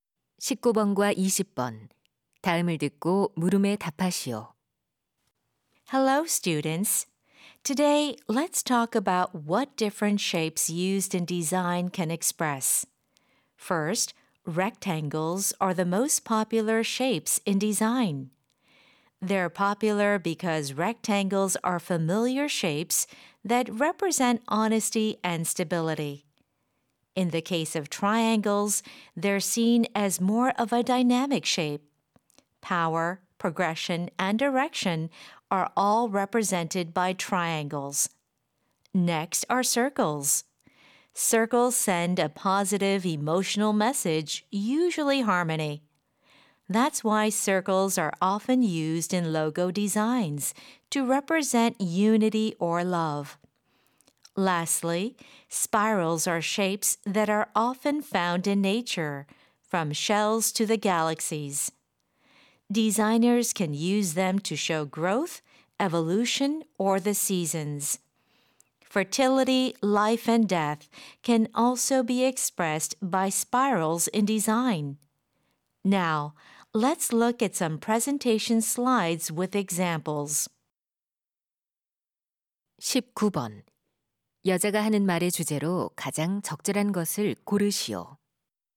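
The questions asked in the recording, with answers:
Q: 여자가 하는 말의 주제로 가장 적절한 것을 고르시오.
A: 디자인에 쓰이는 여러 모양이 표현하는 의미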